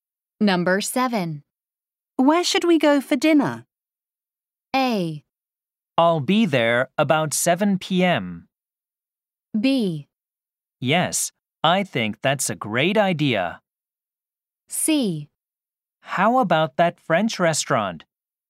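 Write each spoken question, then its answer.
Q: Where should we go for dinner?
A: C: How about that French restaurant?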